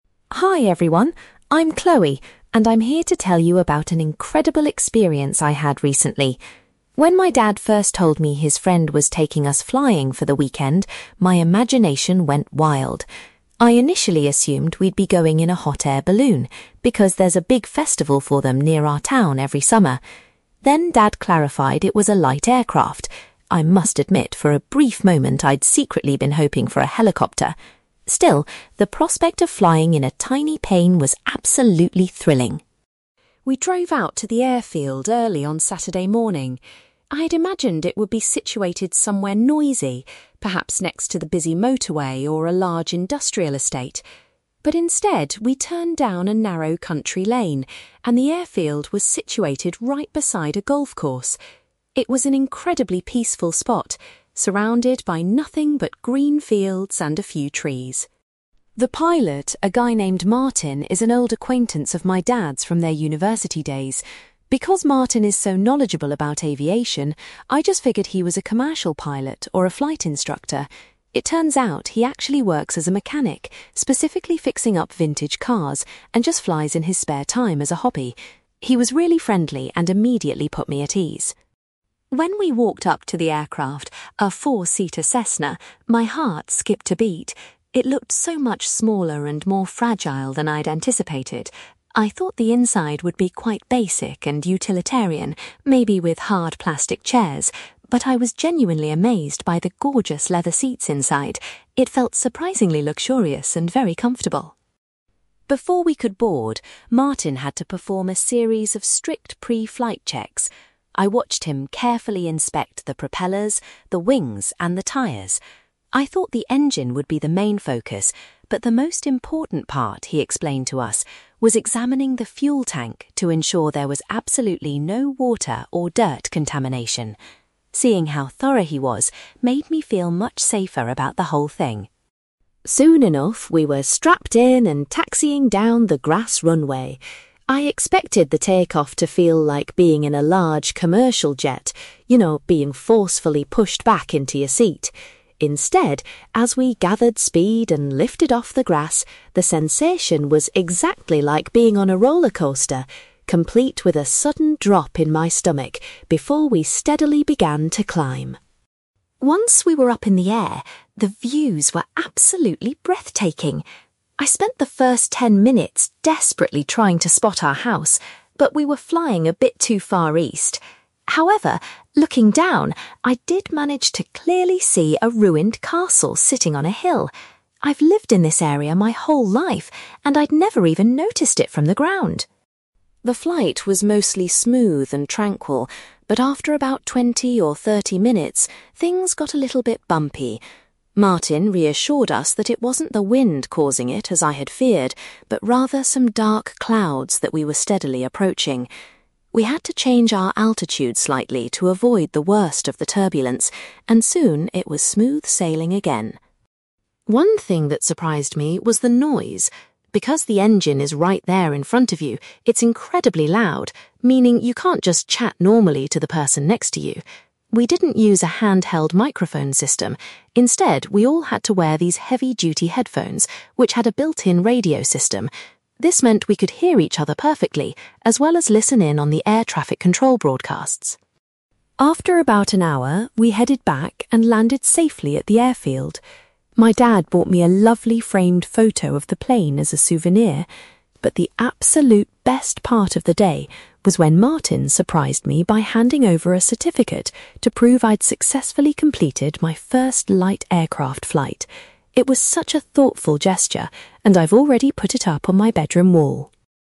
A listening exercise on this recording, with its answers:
You will hear a young woman called Chloe talking about her experience flying in a private light aircraft. For questions 9-18, complete the sentences with a word or short phrase.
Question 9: Chloe admits that she would have preferred to fly in a (9)........................... .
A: helicopter

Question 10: Chloe was surprised that the airfield was located so close to a (10)........................... .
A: golf course

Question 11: Chloe found out that Martin's actual job was working as a (11)........................... .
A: mechanic

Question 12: Chloe was impressed by the aircraft's (12)........................... when she looked inside.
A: leather seats

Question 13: Martin told Chloe that checking the (13)........................... was the most crucial pre-flight task.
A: fuel tank

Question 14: Chloe compares the feeling of taking off to riding on a (14)........................... .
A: rollercoaster

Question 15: From the air, Chloe was able to spot a (15)........................... situated on a hill.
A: ruined castle

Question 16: The flight became bumpy due to the presence of some (16)........................... .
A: dark clouds

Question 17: Chloe explains that the passengers had to wear (17)........................... to communicate during the flight.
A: headphones

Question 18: Chloe was delighted to receive a (18)........................... from the pilot after the flight.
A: certificate

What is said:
Chloe: Hi everyone, I'm Chloe, and I'm here to tell you about an incredible experience I had recently. When my dad first told me his friend was taking us flying for the weekend, my imagination went wild. I initially assumed we'd be going in a hot-air balloon, because there's a big festival for them near our town every summer. Then dad clarified it was a light aircraft. I must admit, for a brief moment I'd secretly been hoping for a helicopter! Still, the prospect of flying in a tiny plane was absolutely thrilling.
We drove out to the airfield early on Saturday morning. I had imagined it would be situated somewhere noisy, perhaps next to the busy motorway or a large industrial estate. But instead, we turned down a narrow country lane, and the airfield was situated right beside a golf course. It was an incredibly peaceful spot, surrounded by nothing but green fields and a few trees.
The pilot, a guy named Martin, is an old acquaintance of my dad's from their university days. Because Martin is so knowledgeable about aviation, I just figured he was a commercial pilot or a flight instructor. It turns out he actually works as a mechanic, specifically fixing up vintage cars, and just flies in his spare time as a hobby. He was really friendly and immediately put me at ease.
When we walked up to the aircraft, a four-seater Cessna, my heart skipped a beat. It looked so much smaller and more fragile than I'd anticipated. I thought the inside would be quite basic and utilitarian, maybe with hard plastic chairs. But I was genuinely amazed by the gorgeous leather seats inside. It felt surprisingly luxurious and very comfortable.
Before we could board, Martin had to perform a series of strict pre-flight checks. I watched him carefully inspect the propellers, the wings, and the tyres. I thought the engine would be the main focus, but the most important part, he explained to us, was examining the fuel tank to ensure there was absolutely no water or dirt contamination. Seeing how thorough he was made me feel much safer about the whole thing!
Soon enough, we were strapped in and taxiing down the grass runway. I expected the take-off to feel like being in a large commercial jet, you know, being forcefully pushed back into your seat. Instead, as we gathered speed and lifted off the grass, the sensation was exactly like being on a rollercoaster, complete with a sudden drop in my stomach before we steadily began to climb.
Once we were up in the air, the views were absolutely breathtaking. I spent the first ten minutes desperately trying to spot our house, but we were flying a bit too far east. However, looking down, I did manage to clearly see a ruined castle sitting on a hill. I've lived in this area my whole life and I'd never even noticed it from the ground!
The flight was mostly smooth and tranquil, but after about twenty or thirty minutes, things got a little bit bumpy. Martin reassured us that it wasn't the wind causing it, as I had feared, but rather some dark clouds that we were steadily approaching. We had to change our altitude slightly to avoid the worst of the turbulence, and soon it was smooth sailing again.
One thing that surprised me was the noise. Because the engine is right there in front of you, it's incredibly loud, meaning you can't just chat normally to the person next to you. We didn't use a handheld microphone system; instead, we all had to wear these heavy-duty headphones which had a built-in radio system. This meant we could hear each other perfectly, as well as listen in on the air traffic control broadcasts.
After about an hour, we headed back and landed safely at the airfield. My dad bought me a lovely framed photo of the plane as a souvenir. But the absolute best part of the day was when Martin surprised me by handing over a certificate to prove I'd successfully completed my first light aircraft flight. It was such a thoughtful gesture, and I've already put it up on my bedroom wall.

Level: B2